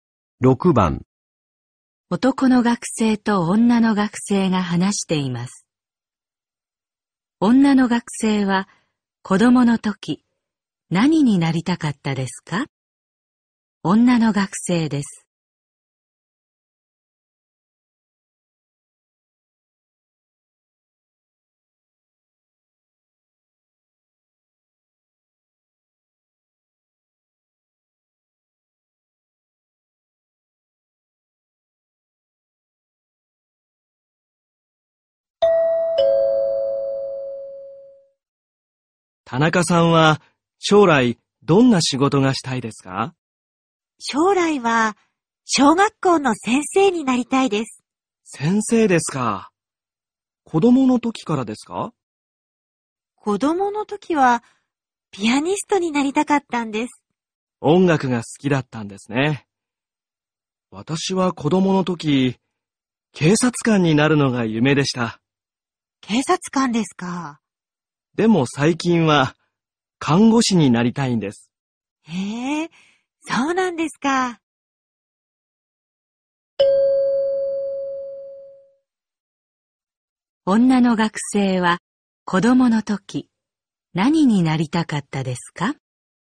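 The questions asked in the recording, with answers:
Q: 女の学生は子供の時何になりたかったですか?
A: ピアニスト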